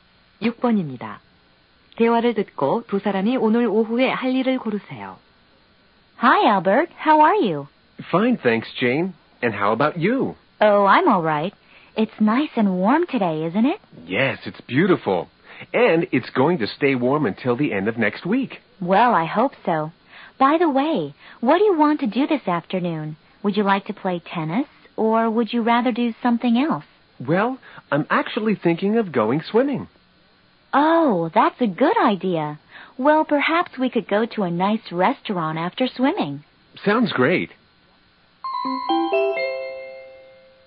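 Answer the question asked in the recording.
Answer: 수영하러 가기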